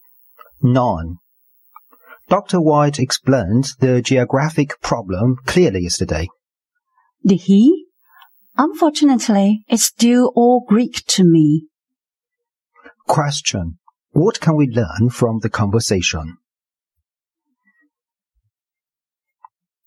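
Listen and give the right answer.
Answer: The speaker still doesn't understand the problem.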